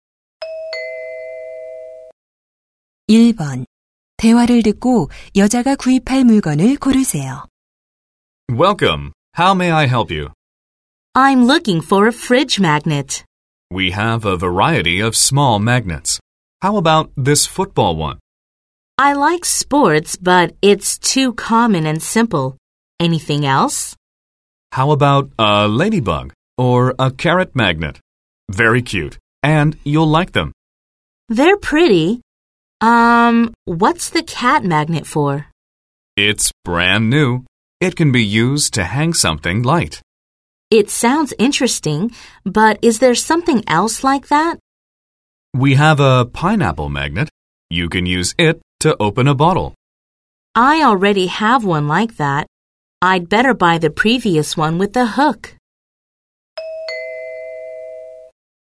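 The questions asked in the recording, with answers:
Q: 대화를 듣고 여자가 구입할 물건을 고르세요.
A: 고양이 자석 (고리 달린 것)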